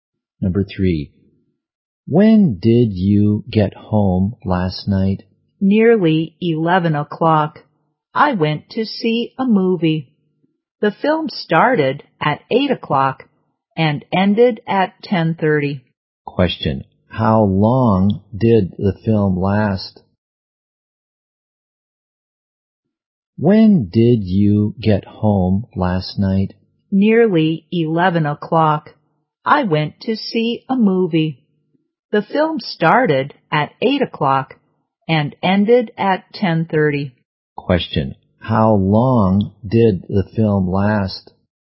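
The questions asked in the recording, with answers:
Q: how long did the film last?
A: Two and a half hours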